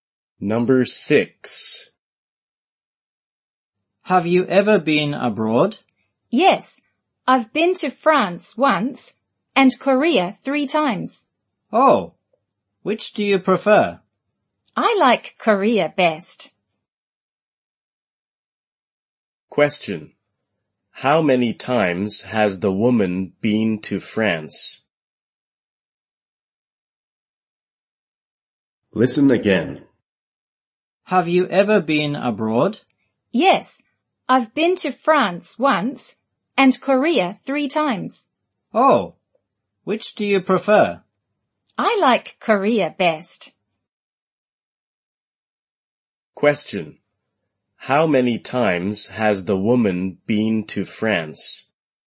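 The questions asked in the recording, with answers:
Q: How many times has the woman been to France?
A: Once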